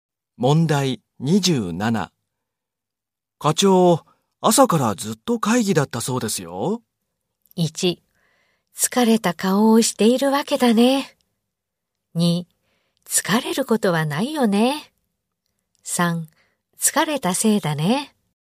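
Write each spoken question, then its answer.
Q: 課長、朝からずっと会議だったそうですよ。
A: 1: 疲れた顔をしているわけだね。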